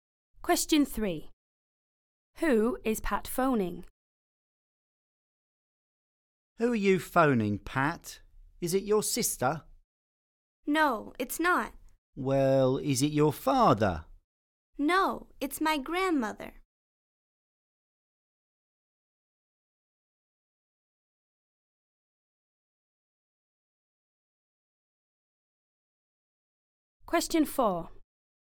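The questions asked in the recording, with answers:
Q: Who is Pat phoning?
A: her grandmother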